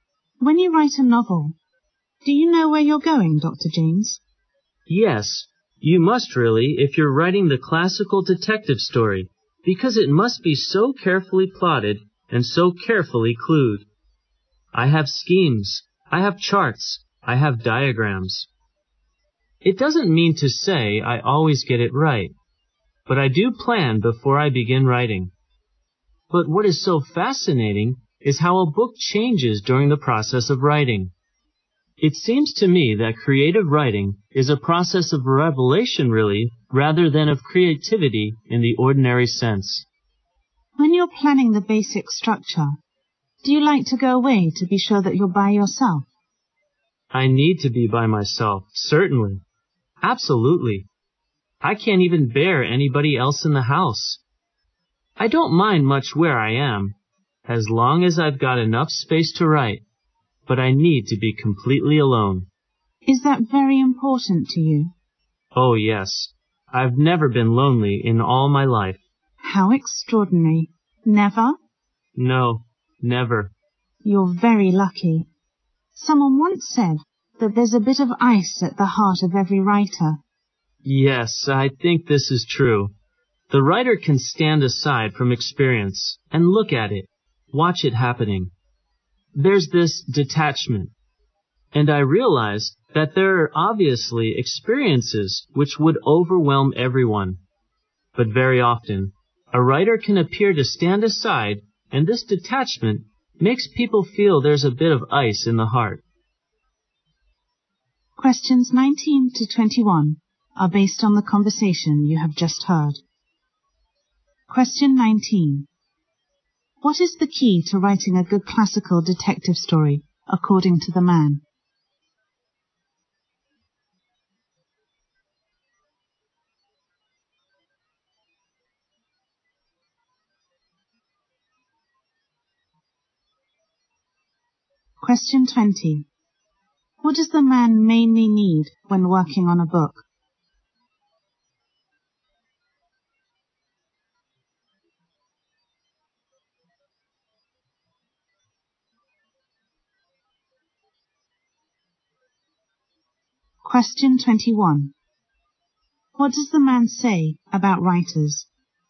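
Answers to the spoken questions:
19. Careful plotting and clueing.
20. To be completely alone.
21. They can stand aside from experience with detachment.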